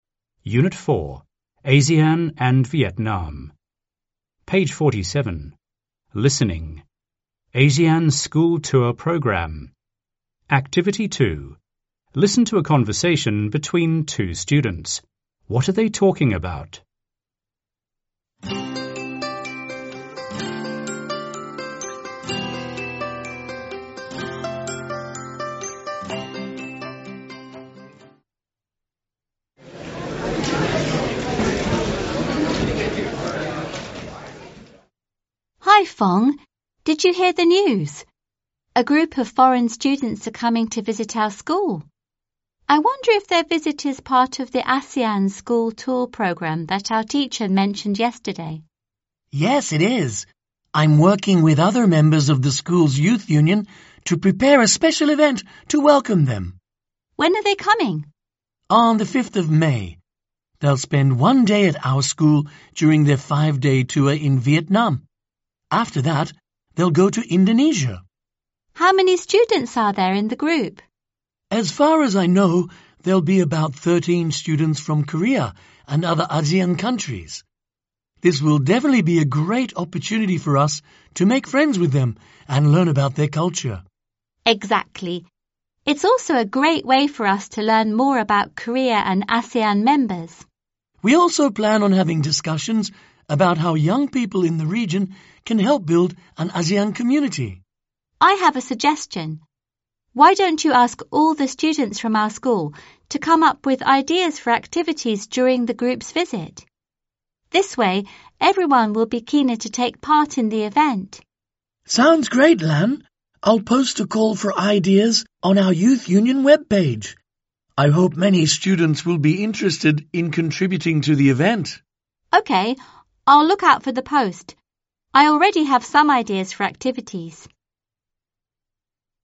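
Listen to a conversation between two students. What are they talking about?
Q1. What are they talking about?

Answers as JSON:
{"1": "A visit to their school by a group of foreign students on the ASEAN School Tour Program"}

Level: TIẾNG ANH 11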